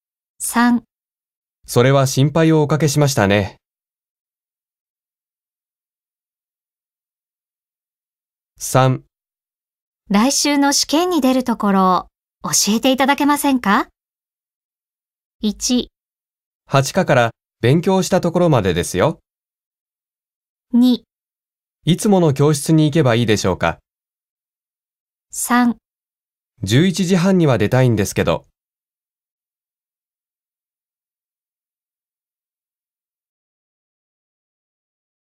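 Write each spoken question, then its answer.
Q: 来週の試験に出るところを教えていただけませんか?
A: 1: 8課から勉強したところまでですよ。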